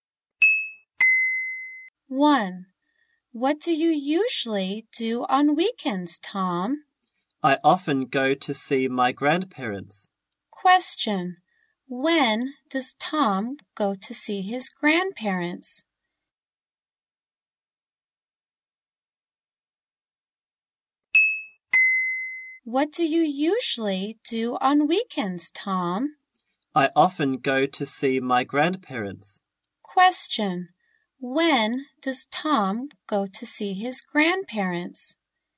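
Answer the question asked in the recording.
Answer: On weekends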